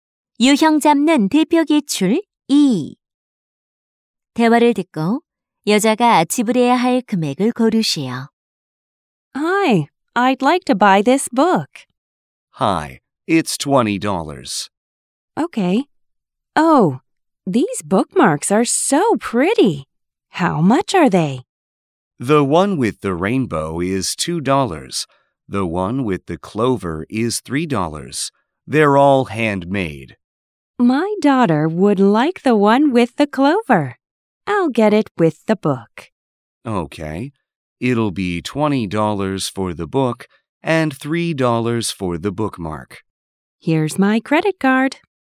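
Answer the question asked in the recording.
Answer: 23달러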